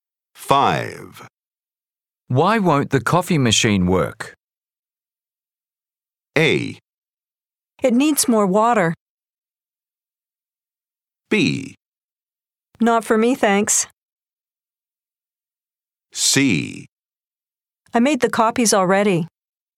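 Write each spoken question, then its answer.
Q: Why won't the coffee machine work?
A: A: It needs more water.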